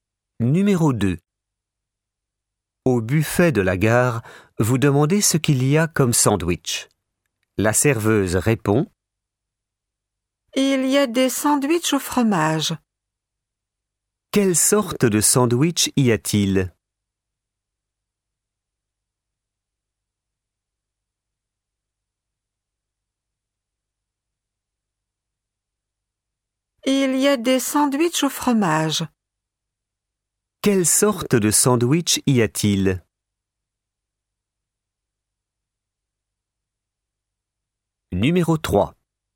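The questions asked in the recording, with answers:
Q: Quelle sorte de sandwich y a-t-il?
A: Des sandwichs au fromage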